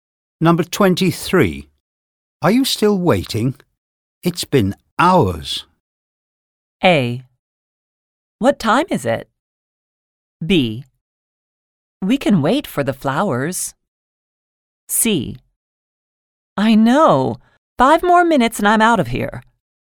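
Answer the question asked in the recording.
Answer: C: I know. 5 more minutes and I'm out of here.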